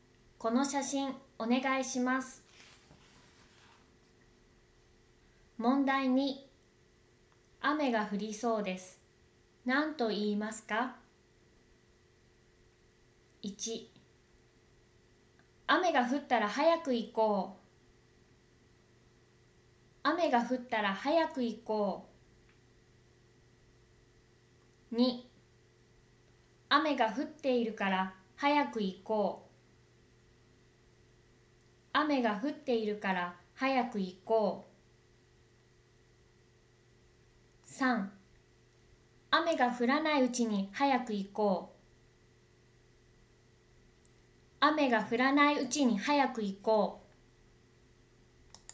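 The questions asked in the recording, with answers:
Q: 雨が降りそうです。何と言いますか?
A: 3: 雨が降らないうちに早く行こう。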